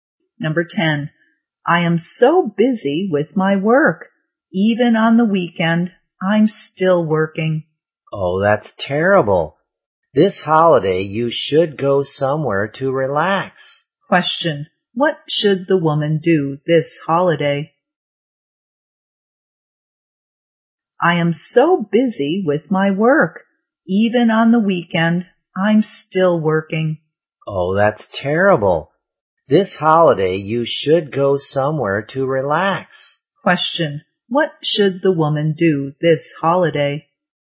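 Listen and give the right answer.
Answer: Go somewhere to relax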